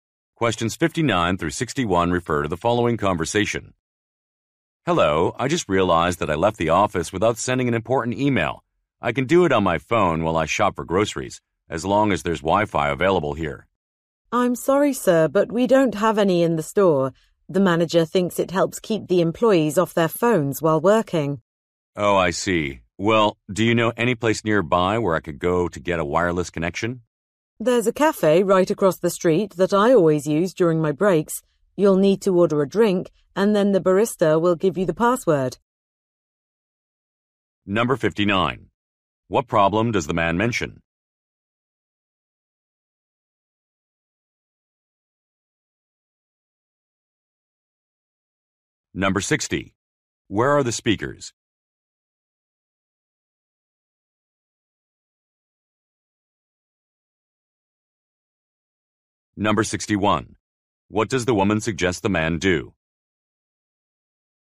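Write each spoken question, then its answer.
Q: What problem does the man mention?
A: He forgot to send an important email

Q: Where are the speakers?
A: In a grocery store

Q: What does the woman suggest the man do?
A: Go to the cafe across the street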